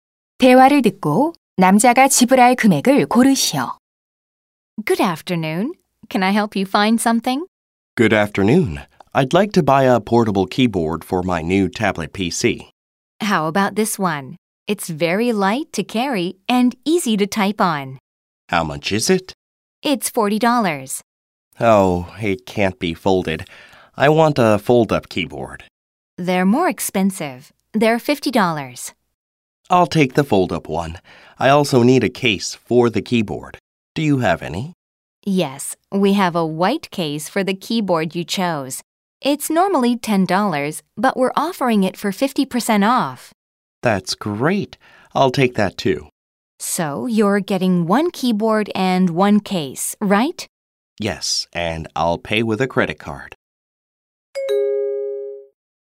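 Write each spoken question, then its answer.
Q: 대화를 듣고 남자가 지불할 금액을 고르시오.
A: 55달러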